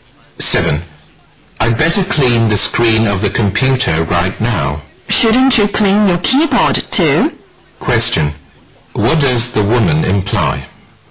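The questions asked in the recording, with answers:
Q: What does the woman imply?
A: The man should clean the keyboard too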